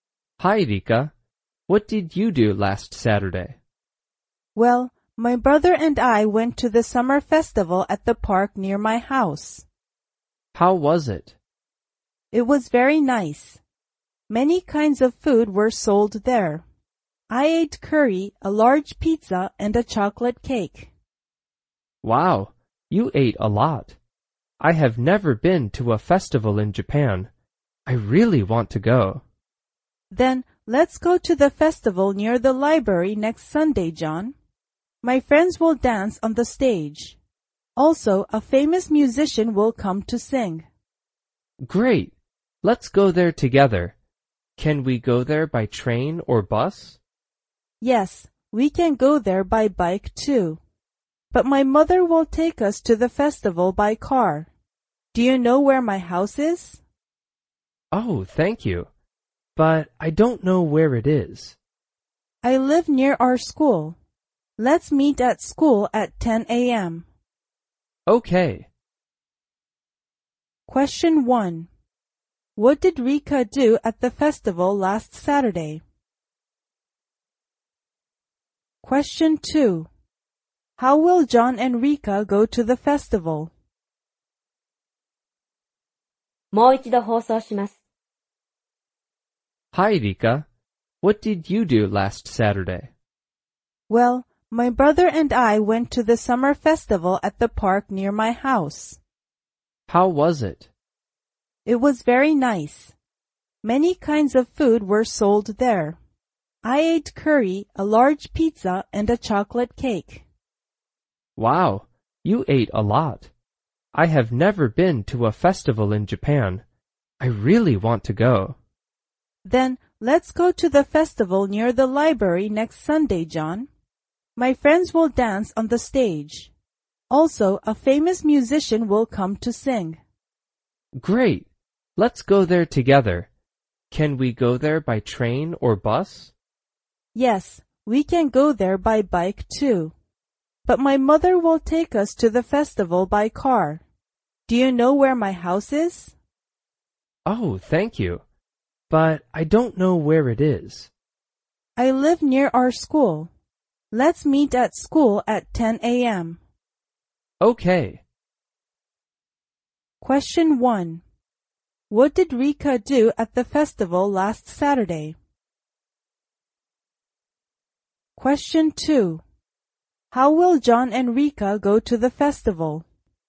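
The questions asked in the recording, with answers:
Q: What did Rika do at the festival last Saturday?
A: She ate curry, a large pizza and a chocolate cake.

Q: How will John and Rika go to the festival?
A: By car.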